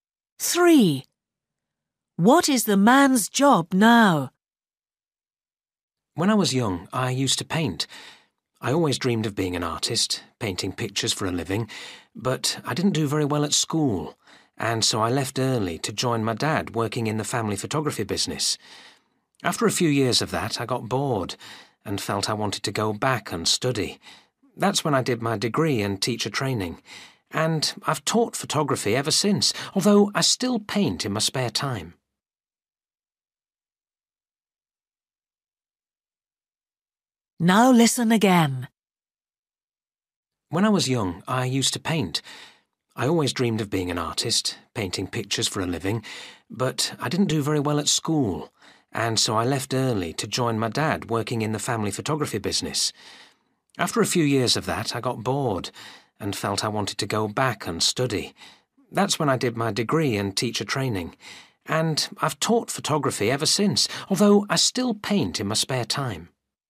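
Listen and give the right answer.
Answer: Photography teacher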